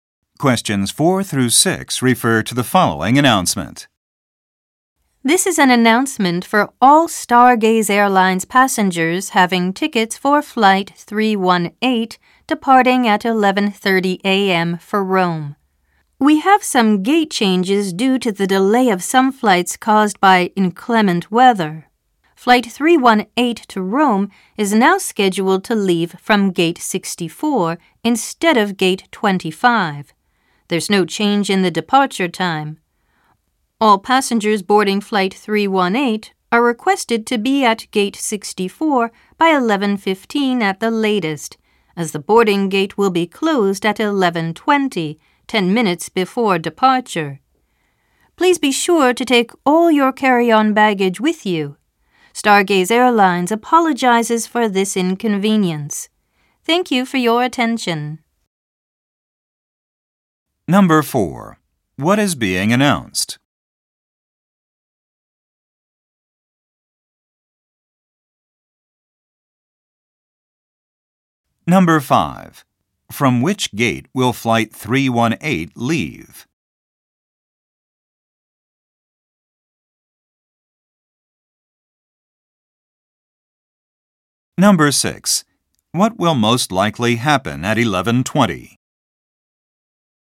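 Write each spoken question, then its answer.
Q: What is being announced?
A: A gate change for Flight 318

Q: From which gate will Flight 318 leave?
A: Gate 64

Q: What will most likely happen at 11:20?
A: The boarding gate will close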